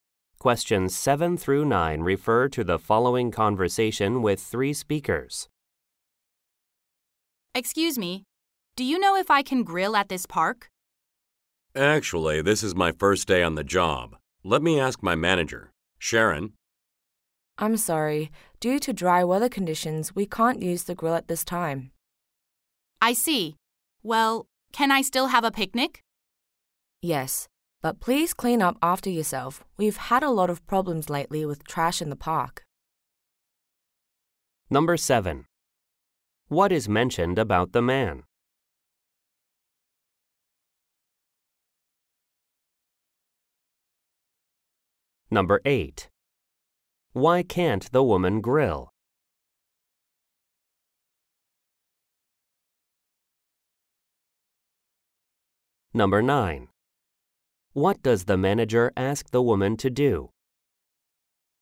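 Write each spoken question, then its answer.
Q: What is mentioned about the man?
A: It is his first day on the job

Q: Why can't the woman grill?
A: Because of dry weather conditions

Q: What does the manager ask the woman to do?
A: Clean up after herself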